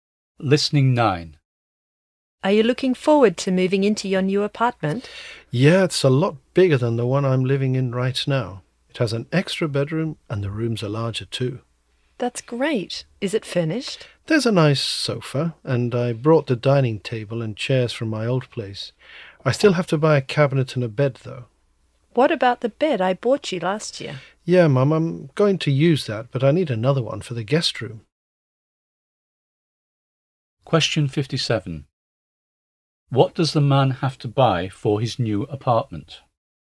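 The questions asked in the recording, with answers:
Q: What does the man have to buy for his new apartment?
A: A cabinet and a bed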